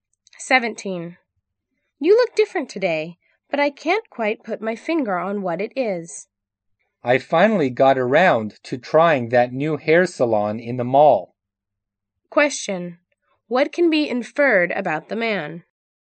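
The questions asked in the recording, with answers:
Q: What can be inferred about the man?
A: He got a new hairstyle at the new salon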